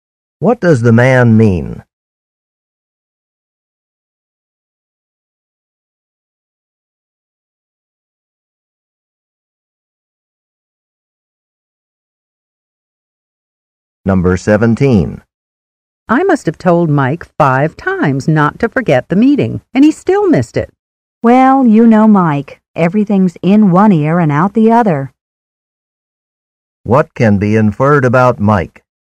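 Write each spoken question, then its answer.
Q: What can be inferred about Mike?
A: He forgets what people tell him.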